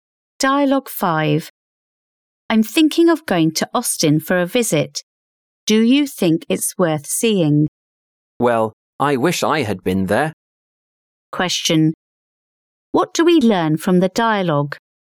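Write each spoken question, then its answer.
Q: What do we learn from the dialogue?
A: The second speaker has never been to Austin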